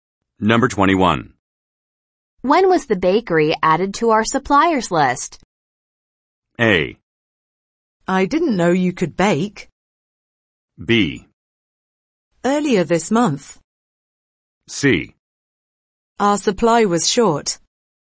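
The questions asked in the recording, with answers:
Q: When was the bakery added to our suppliers list?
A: B: Earlier this month.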